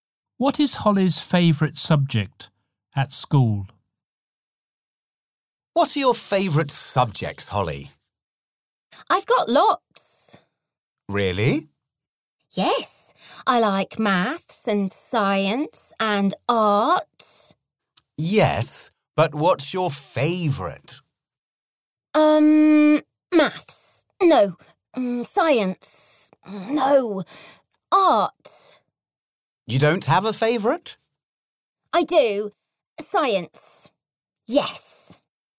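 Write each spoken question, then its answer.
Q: What is Holly's favourite subject at school?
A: Science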